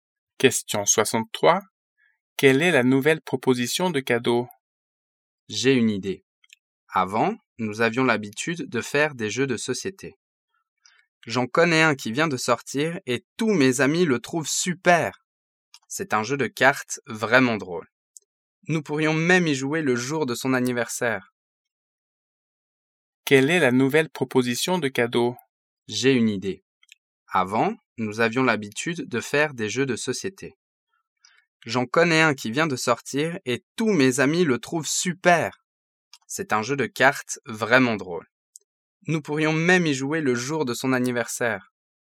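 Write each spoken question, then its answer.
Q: Quelle est la nouvelle proposition de cadeau?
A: Un jeu de cartes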